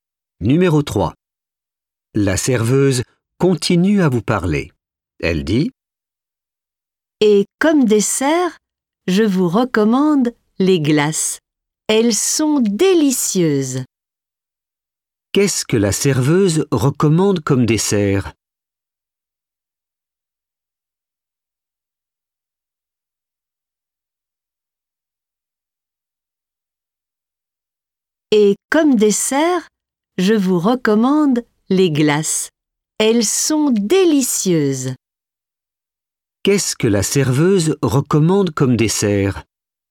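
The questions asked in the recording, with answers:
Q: Qu'est-ce que la serveuse recommande comme dessert?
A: les glaces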